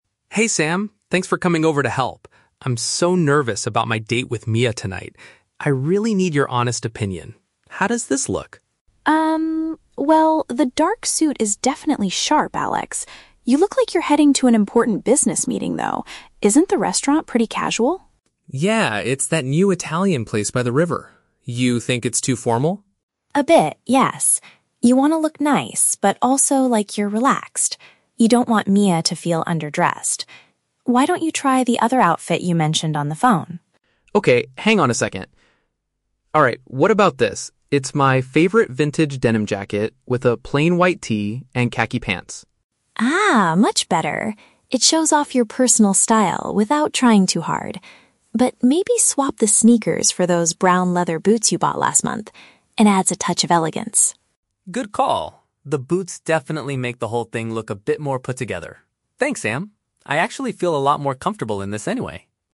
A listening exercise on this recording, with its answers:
Listen to the conversation between two friends and choose the correct answer (A, B, or C) for each question.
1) Why does Sam think the first outfit is a bad idea?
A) It is not stylish enough for a date.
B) It looks too professional for the location.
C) It is too uncomfortable to wear all evening.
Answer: It looks too professional for the location.

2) What does Alex eventually decide to wear on the upper half of his body?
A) A dark suit jacket.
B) A white T-shirt and a jean jacket.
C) A vintage sweater and a coat.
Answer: A white T-shirt and a jean jacket.

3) How does Sam suggest improving the second outfit?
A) By wearing a more colorful shirt.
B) By changing his footwear.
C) By putting on a leather belt.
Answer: By changing his footwear.

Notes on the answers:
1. Sam says the suit makes Alex look like he is "heading to an important business meeting" and agrees it is "too formal" for a casual restaurant.
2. Alex changes into his "favorite vintage denim jacket with a plain white tee" (tee = T-shirt, denim = jean material). This tests the student's ability to recognize paraphrased vocabulary.
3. Sam tells Alex to "swap the sneakers for those brown leather boots," which means he should change the shoes he is wearing.

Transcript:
Alex: Hey Sam, thanks for coming over to help. I'm so nervous about my date with Mia tonight. I really need your honest opinion. How does this look?
well, the dark suit is definitely sharp, Alex. You look like you're heading to an important business meeting, though. Isn't the restaurant pretty casual?
Alex: Yeah, it's that new Italian place by the river. You think it's too formal?
Sam: A bit, yes. You want to look nice, but also like you're relaxed. You don't want Mia to feel underdressed. Why don't you try the other outfit you mentioned on the phone?
Alex: Okay, hang on a second. (pause) Alright, what about this? It's my favorite vintage denim jacket with a plain white tee and khaki pants.
Sam: Ah, much better! It shows off your personal style without trying too hard. But maybe swap the sneakers for those brown leather boots you bought last month? It adds a touch of elegance.
Alex: Good call. The boots definitely make the whole thing look a bit more put-together. Thanks, Sam. I actually feel a lot more comfortable in this anyway.

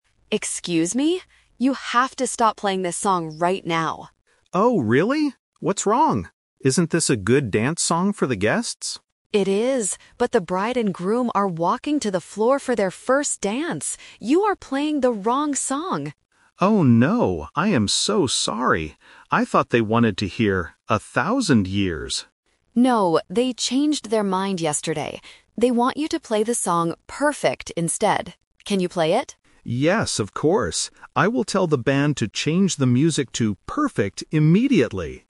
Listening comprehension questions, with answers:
Listen to the conversation at a wedding party. Choose the correct answer (A, B, or C) for each question.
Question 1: Why does the woman want the band to stop playing the song?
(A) Because the song is too loud for the guests.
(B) Because the bride and groom are ready for their first dance.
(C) Because the band is playing the music too slowly.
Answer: Because the bride and groom are ready for their first dance.

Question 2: What song did the band play FIRST?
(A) "Perfect".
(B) A fast dance song.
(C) "A Thousand Years".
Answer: "A Thousand Years".

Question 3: When did the bride and groom change their minds about the music?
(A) Yesterday.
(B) Right now.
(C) Last week.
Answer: Yesterday.

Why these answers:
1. The woman says: "...the bride and groom are walking to the floor for their first dance! You are playing the wrong song." Option (A) is a logical guess at a party, but it is not mentioned. Option (C) is also an unmentioned distractor.
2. The band leader states what he was playing: "I thought they wanted to hear 'A Thousand Years'." Option (A) is the A2 Twist/Trap; "Perfect" is the correct song they will play next, not the one they played first. Option (B) is a trap using the word "dance" from the conversation.
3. The woman explicitly gives the time: "No, they changed their mind yesterday." Option (B) is a trap because the dance is happening "right now", but the decision was made earlier. Option (C) is a plausible time frame but is not mentioned in the audio.

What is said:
Woman: Excuse me! You have to stop playing this song right now.
Man: Oh, really? What's wrong? Isn't this a good dance song for the guests?
Woman: It is, but the bride and groom are walking to the floor for their first dance! You are playing the wrong song.
Man: Oh no! I am so sorry. I thought they wanted to hear "A Thousand Years".
Woman: No, they changed their mind yesterday. They want you to play the song "Perfect" instead. Can you play it?
Man: Yes, of course. I will tell the band to change the music to "Perfect" immediately.

